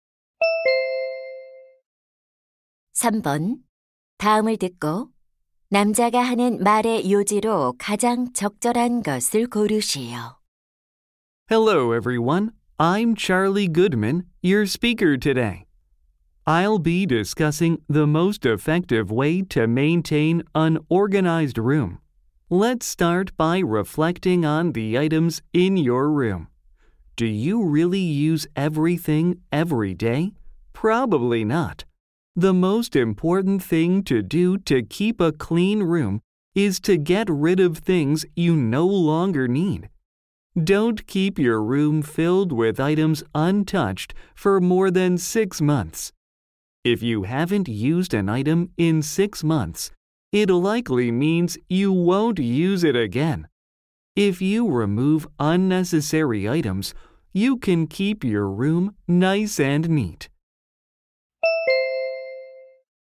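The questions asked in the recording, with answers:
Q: 다음을 듣고 남자가 하는 말의 요지로 가장 적절한 것을 고르시오.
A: 방을 깨끗하게 유지하려면 더 이상 필요 없는 물건을 버려야 한다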